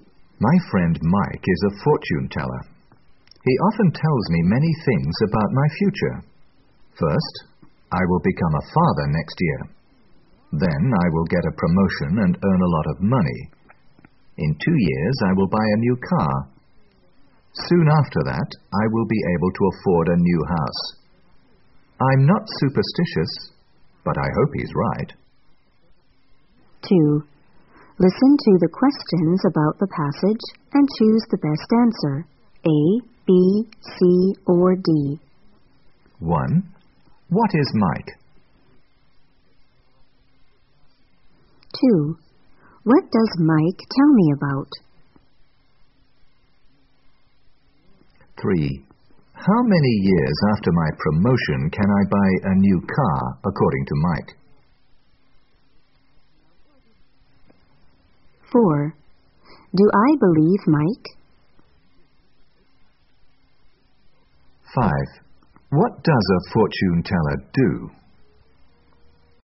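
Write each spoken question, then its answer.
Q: What is Mike?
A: A fortune teller

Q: What does Mike tell me about?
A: My future

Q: What does a fortune teller do?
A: Tells people about their future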